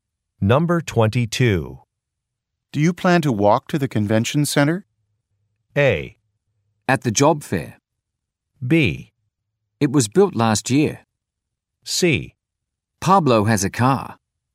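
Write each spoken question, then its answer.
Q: Do you plan to walk to the convention center?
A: C: Pablo has a car.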